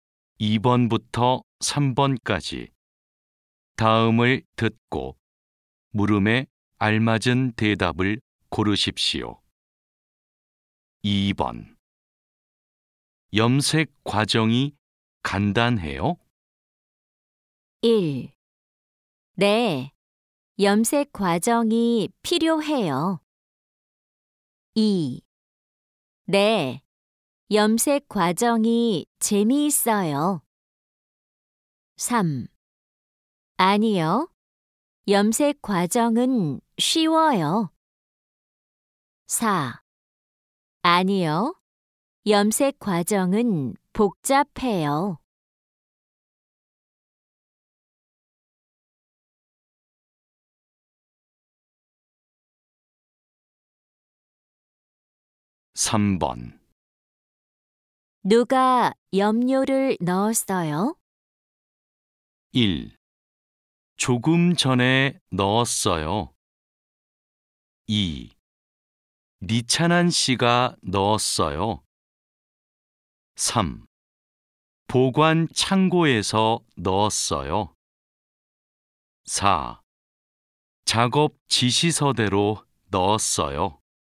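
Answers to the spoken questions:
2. 4: 아니요, 염색 과정은 복잡해요.
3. 2: 리찬한 씨가 넣었어요.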